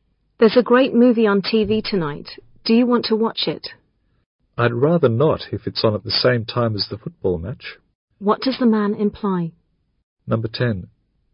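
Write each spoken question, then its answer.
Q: What does the man imply?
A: He'd rather watch the football match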